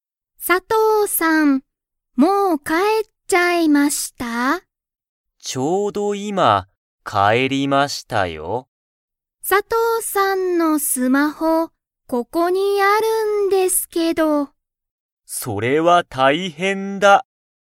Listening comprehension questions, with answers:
佐藤(さとう)さんは、もう帰かえっちゃいましたか?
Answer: はい

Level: Level 1